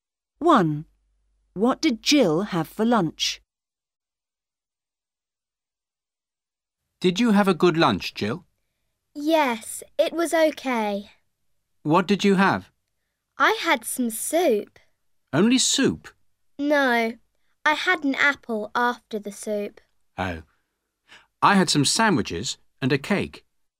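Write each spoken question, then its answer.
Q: What did Jill have for lunch?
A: Soup and an apple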